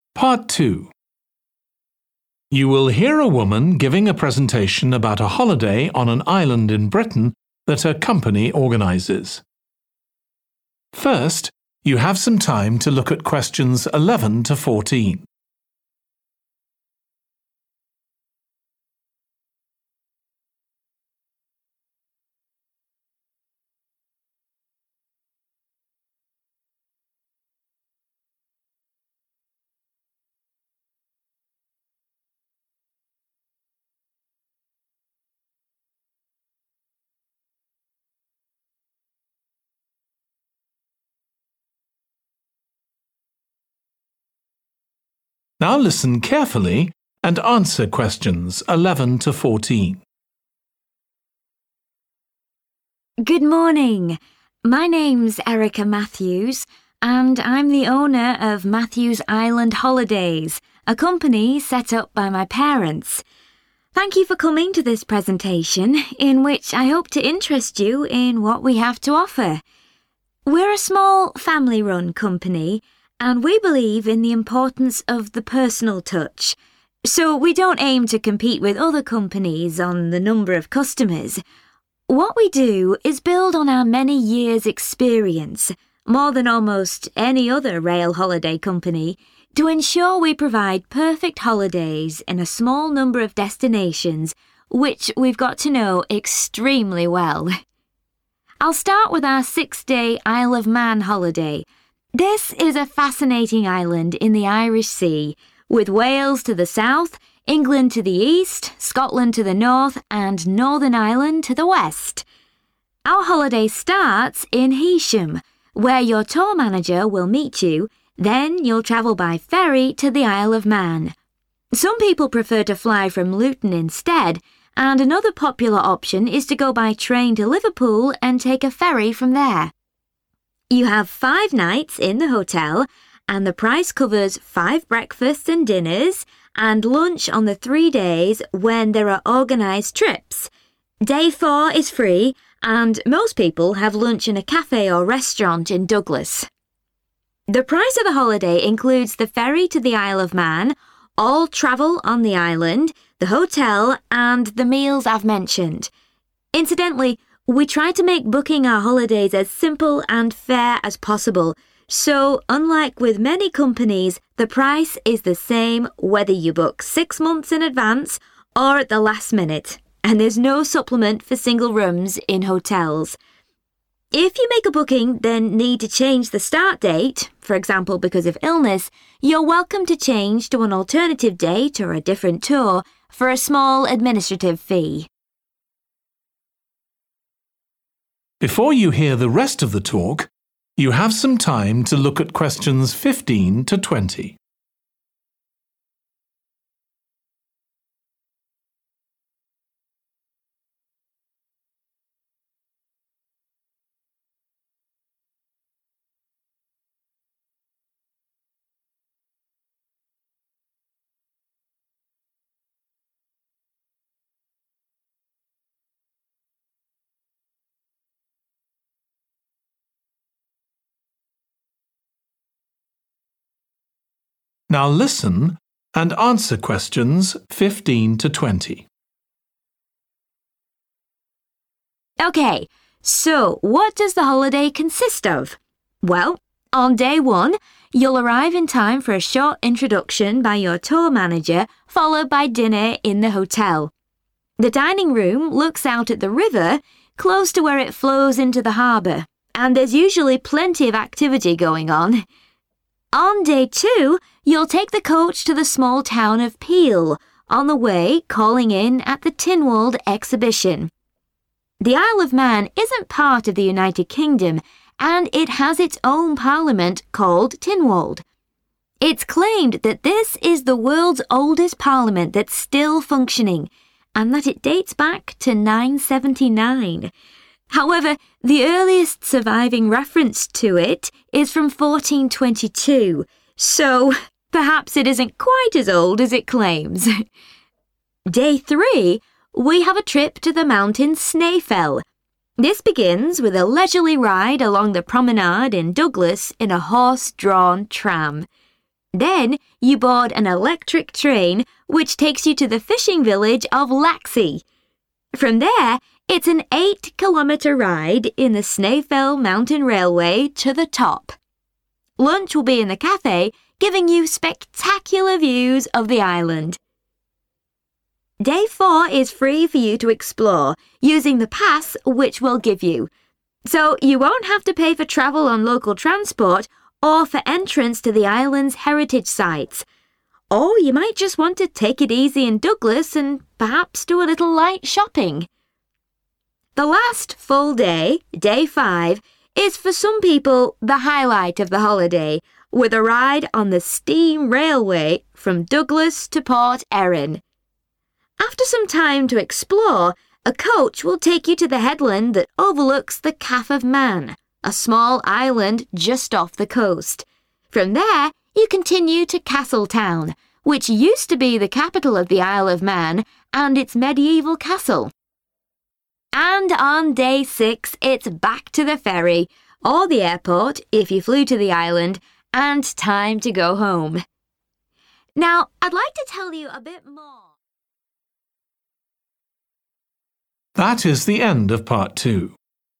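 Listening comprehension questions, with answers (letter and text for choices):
Choose the correct letter, A, B or C.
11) According to the speaker, the company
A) has been in business for longer than most of its competitors.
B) arranges holidays to more destinations than its competitors.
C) has more customers than its competitors.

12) Where can customers meet the tour manager before travelling to the Isle of Man?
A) Liverpool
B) Heysham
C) Luton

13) How many lunches are included in the price of the holiday?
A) three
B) four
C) five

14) Customers have to pay extra for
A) guaranteeing themselves a larger room.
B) booking at short notice.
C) transferring to another date.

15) Hotel dining room has view of the 15............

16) Tynwald may have been founded in 16............ not 979.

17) train to the 17............. of Snaefell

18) Company provides a 18............. for local transport and heritage sites.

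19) Take the 19............. railway train from Douglas to Port Erin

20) Free time, then coach to Castletown – former 20............ has old castle.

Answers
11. A) has been in business for longer than most of its competitors.
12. B) Heysham
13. A) three
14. C) transferring to another date.
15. river
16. 1422
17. top
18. pass
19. steam
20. capital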